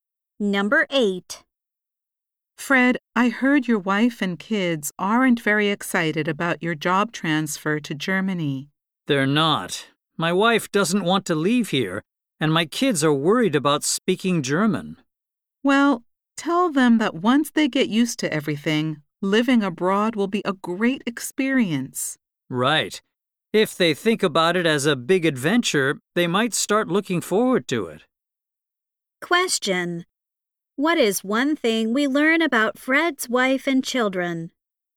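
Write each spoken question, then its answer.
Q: What is one thing we learn about Fred's wife and children?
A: They don't want to move to Germany.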